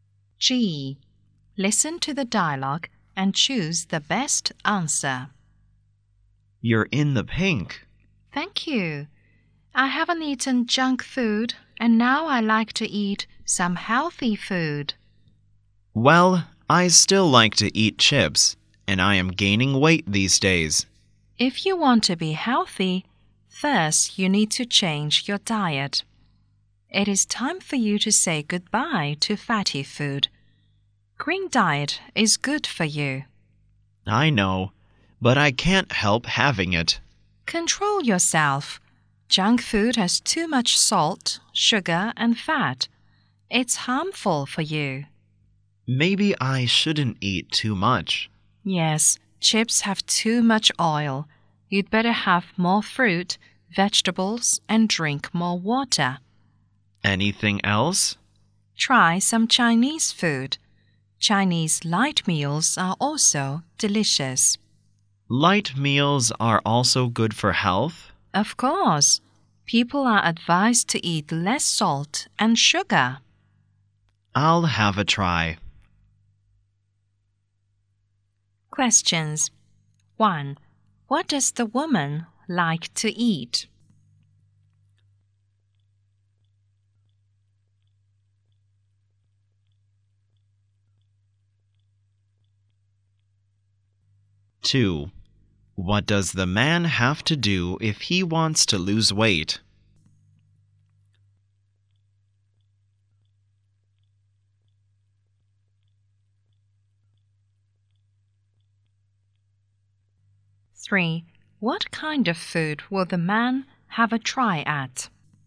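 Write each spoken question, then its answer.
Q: What kind of food will the man have a try at?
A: Chinese light meals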